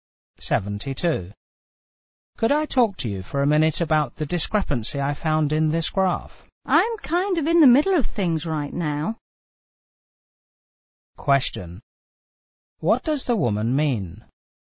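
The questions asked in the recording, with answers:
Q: What does the woman mean?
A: She is busy right now and can't talk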